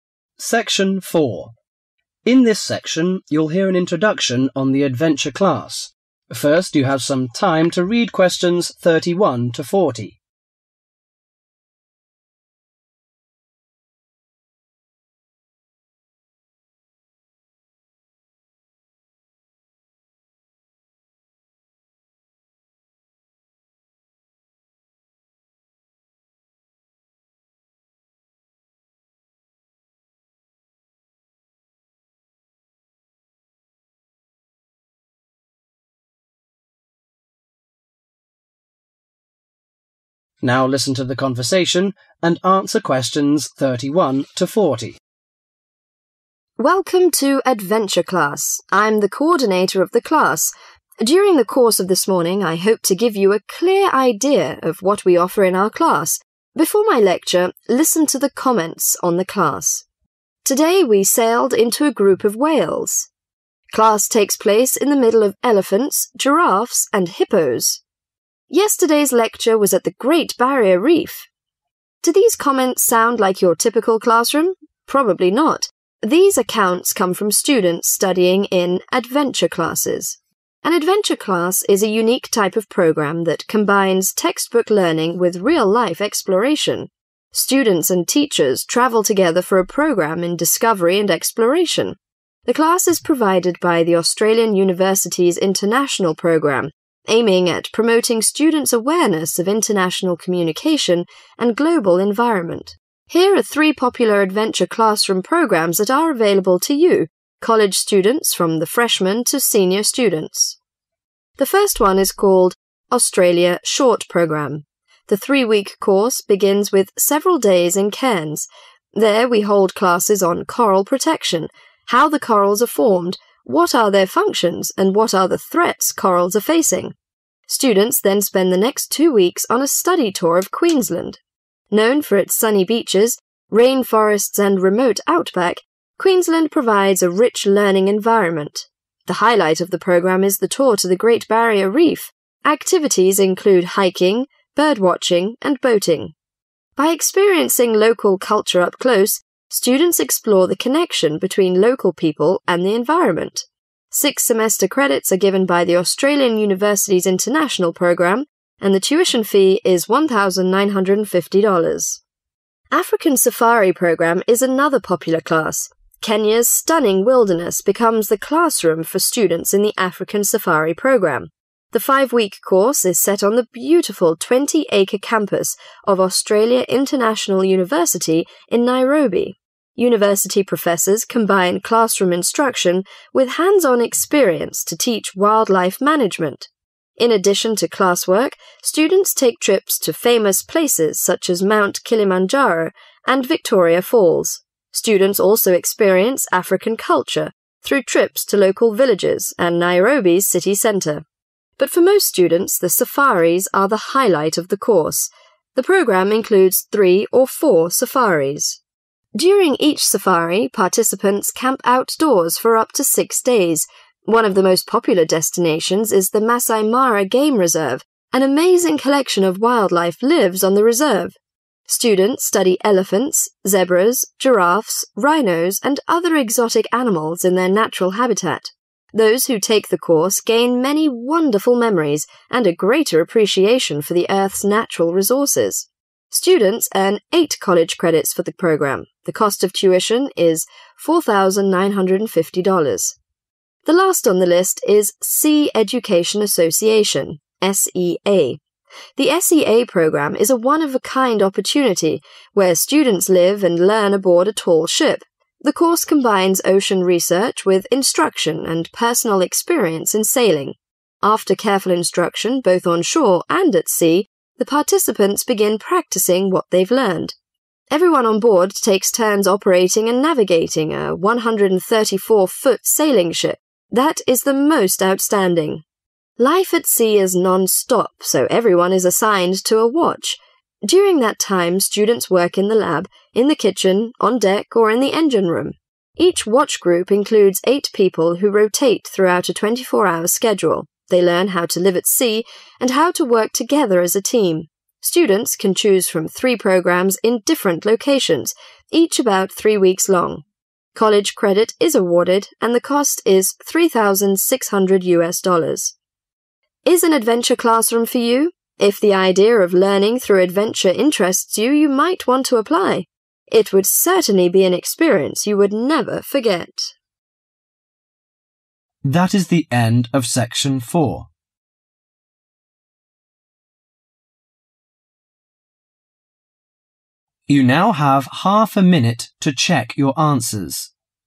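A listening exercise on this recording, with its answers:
Fill in the summary of the lecture with NO MORE THAN THREE WORDS for each answer.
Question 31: A particular program: combine (31) .......................... and real-life exploration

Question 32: Purpose: make students aware of international communication and (32) .......................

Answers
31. textbook learning
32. global environment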